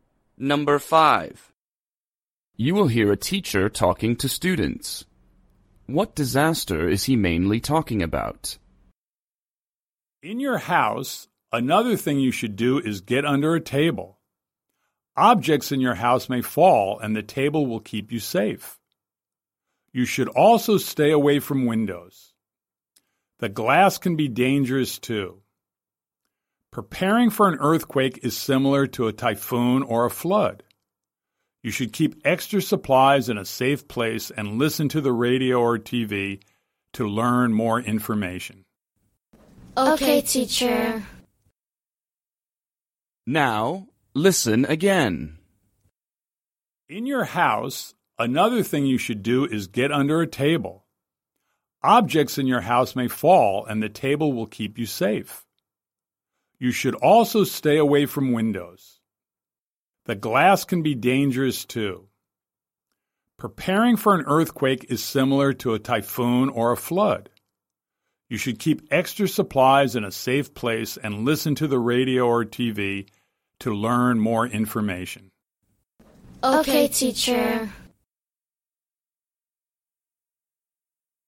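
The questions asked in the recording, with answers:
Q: What disaster is he mainly talking about?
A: An earthquake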